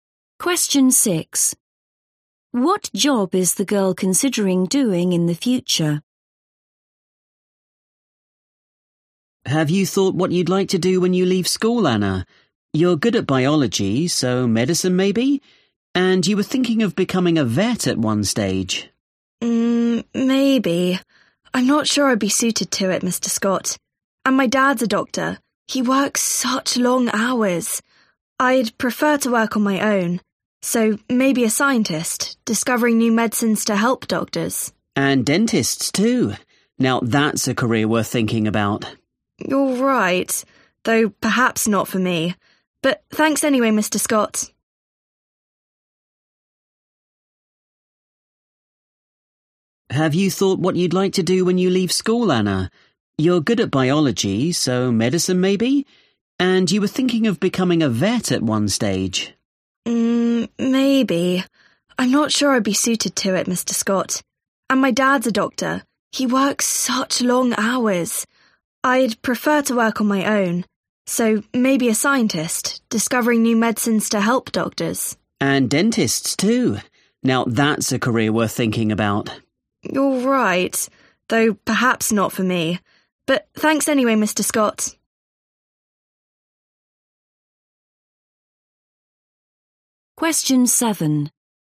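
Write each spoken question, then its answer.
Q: What job is the girl considering doing in the future?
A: scientist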